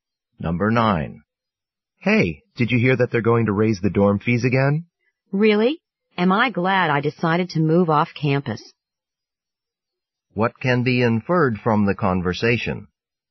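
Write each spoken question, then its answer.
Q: What can be inferred from the conversation?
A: The man no longer lives in the dorm; he moved off campus.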